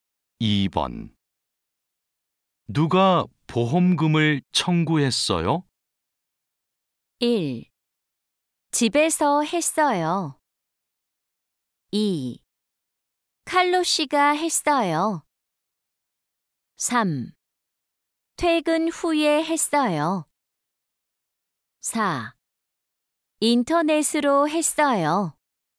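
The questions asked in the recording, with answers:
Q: 누가 보험금을 청구했어요?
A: 2: 칼로 씨가 했어요.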